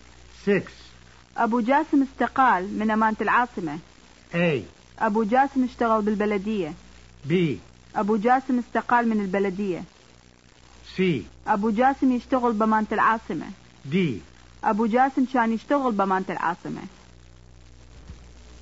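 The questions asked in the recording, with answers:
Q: أبو جاسم استقال من أمانة العاصمة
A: D: أبو جاسم كان يشتغل بأمانة العاصمة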